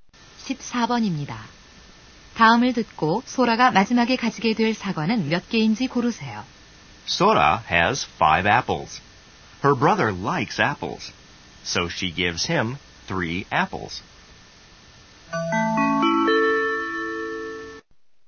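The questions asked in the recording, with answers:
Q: 다음을 듣고 소라가 마지막에 가지게 될 사과는 몇 개인지 고르세요.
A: 2개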